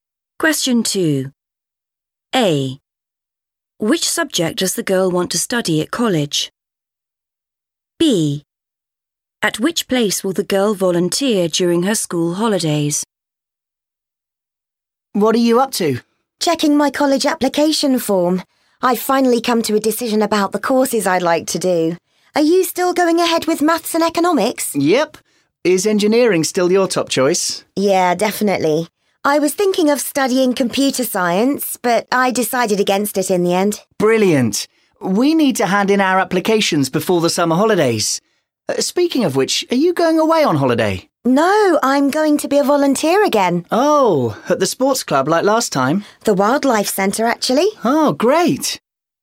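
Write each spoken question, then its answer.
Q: At which place will the girl volunteer during her school holidays?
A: the Wildlife Centre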